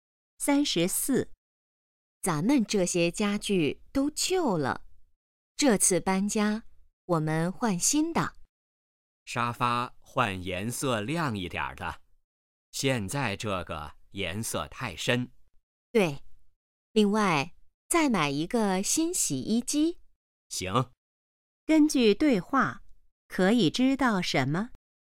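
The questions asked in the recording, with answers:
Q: 根据对话,可以知道什么?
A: 他们要搬家换新家具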